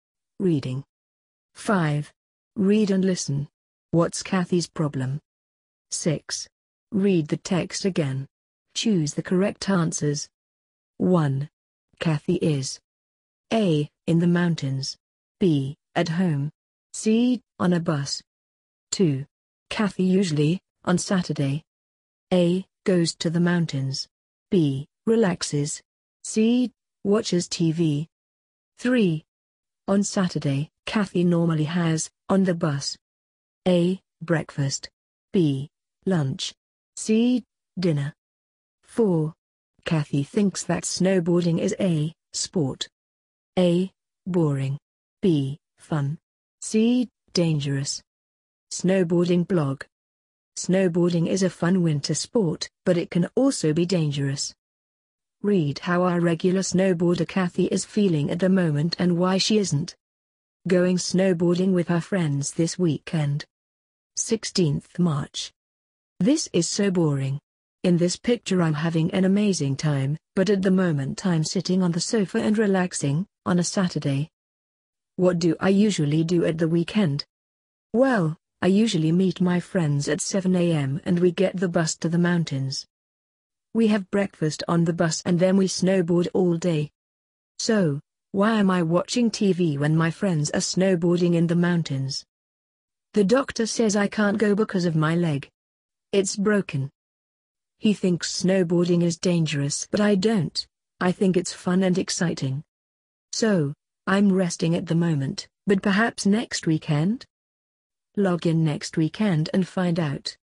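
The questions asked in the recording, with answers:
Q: What's Kathy's problem?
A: She has a broken leg, so she can't go snowboarding.

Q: Kathy is A. in the mountains. B. at home. C. on a bus.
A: B: at home

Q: Kathy usually, on Saturday. A. goes to the mountains. B. relaxes. C. watches TV.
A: A: goes to the mountains

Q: On Saturday, Kathy normally has, on the bus. A. breakfast. B. lunch. C. dinner.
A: A: breakfast

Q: Kathy thinks that snowboarding is A. sport. A. boring. B. fun. C. dangerous.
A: B: fun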